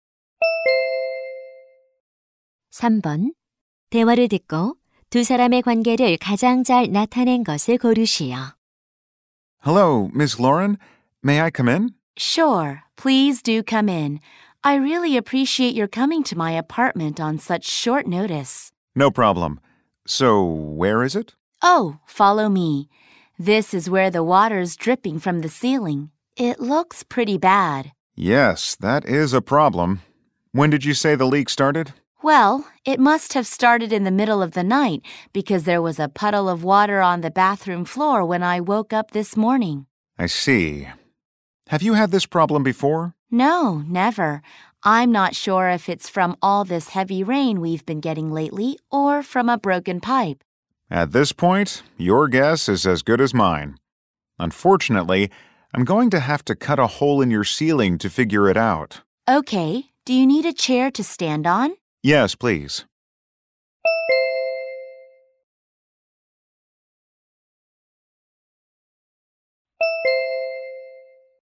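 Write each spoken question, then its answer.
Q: 대화를 듣고 두 사람의 관계를 가장 잘 나타낸 것을 고르시오.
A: 아파트 세입자와 수리 기사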